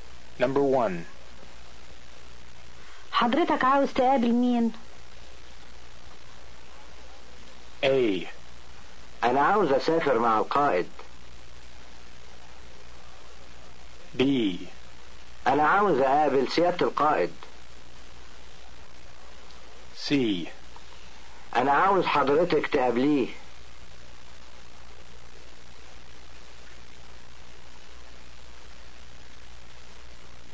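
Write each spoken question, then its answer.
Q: حضرتك عاوز تقابل مين؟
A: B: أنا عاوز أقابل سيادة القائد.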